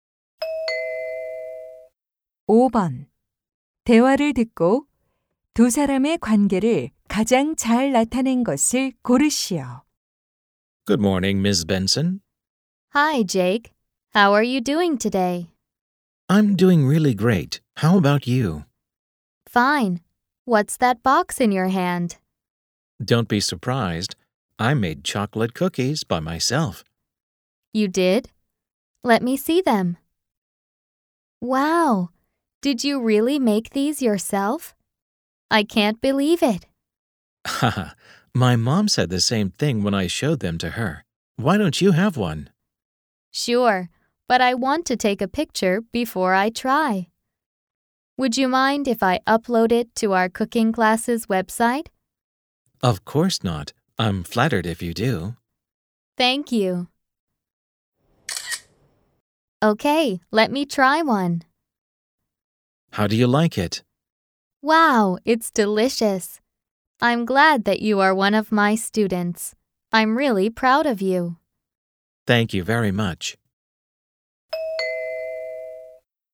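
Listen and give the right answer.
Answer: 요리 강사 - 수강생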